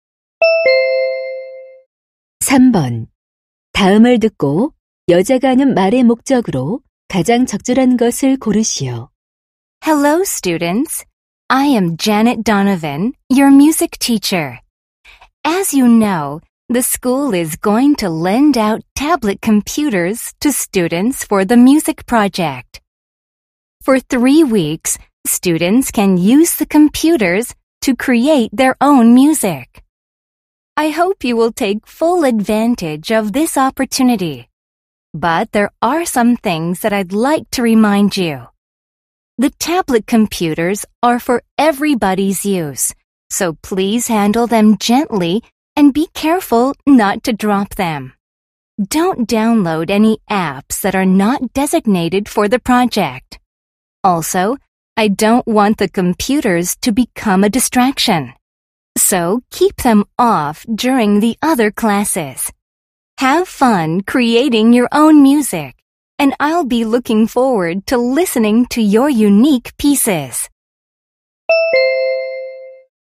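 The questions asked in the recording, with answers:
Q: 다음을 듣고 여자가 하는 말의 목적으로 가장 적절한 것을 고르시오.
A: 음악 프로젝트용 태블릿 컴퓨터 사용 시 주의 사항을 당부하려고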